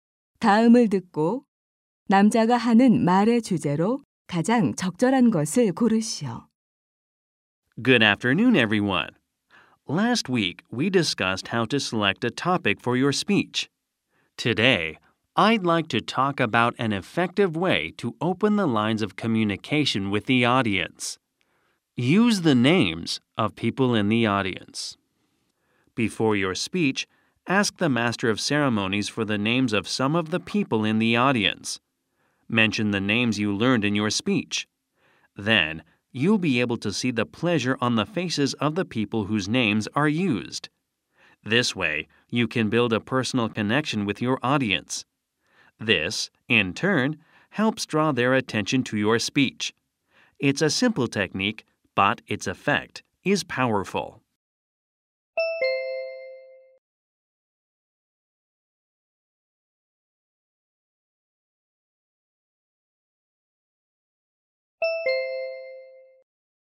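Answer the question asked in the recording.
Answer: 청중의 이름을 사용하여 청중과 소통하는 방법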